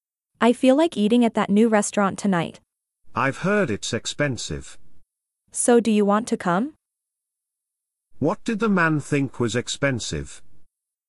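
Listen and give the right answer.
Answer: The new restaurant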